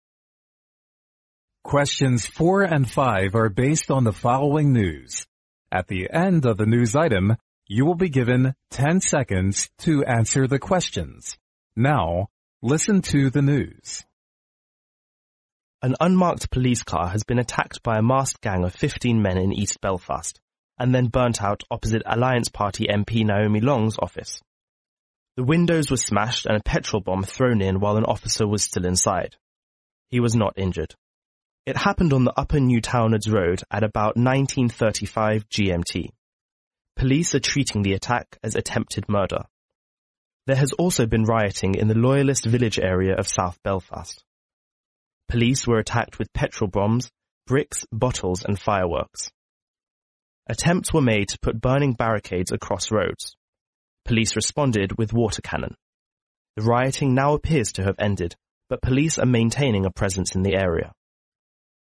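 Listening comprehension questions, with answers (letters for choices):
Now listen to the news.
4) Which of the following is INCORRECT as to the riot in east Belfast?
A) An office was burnt.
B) A police car was damaged.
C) A policeman got injured by petrol bombs.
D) Police were attacked.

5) What did the police do so as to control the situation?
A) They threw petrol bombs to the gang.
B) They took 15 men into custody.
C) They built barricades across roads.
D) They used a water cannon on the rioters.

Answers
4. C
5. D

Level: 英语四级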